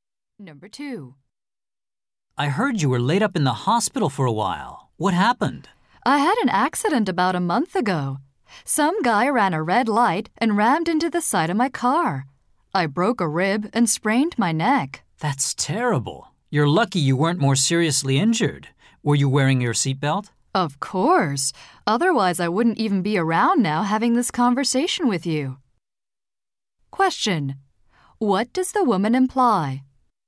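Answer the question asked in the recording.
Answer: Her seatbelt saved her life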